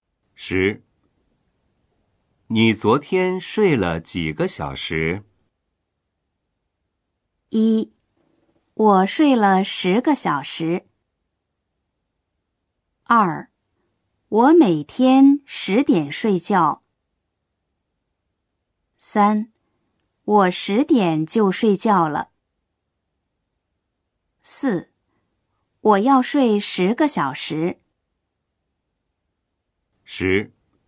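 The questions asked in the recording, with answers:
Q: 你昨天睡了几个小时?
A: 1: 我睡了十个小时。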